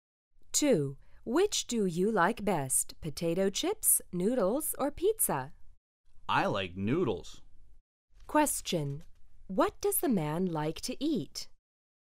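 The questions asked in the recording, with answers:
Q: What does the man like to eat?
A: Noodles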